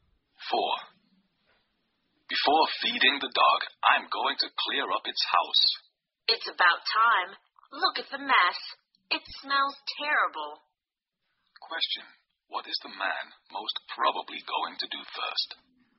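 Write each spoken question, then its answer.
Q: What is the man most probably going to do first?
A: Clean the dog's house.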